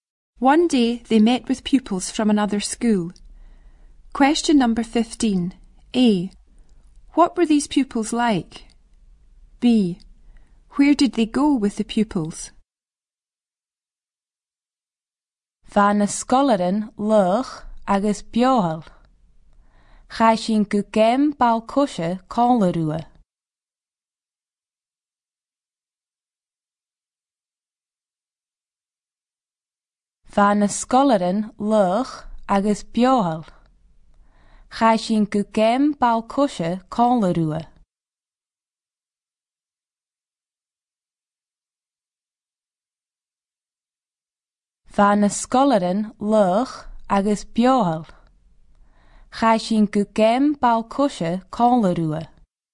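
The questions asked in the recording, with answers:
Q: Where did they go with the pupils?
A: To a football game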